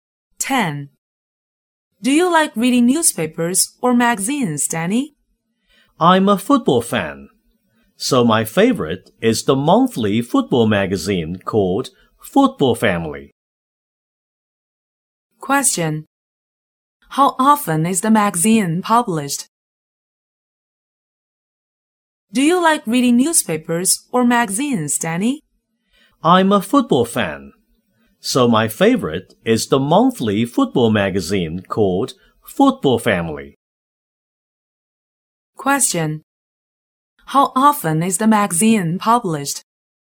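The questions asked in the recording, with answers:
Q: How often is the magazine published?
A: Monthly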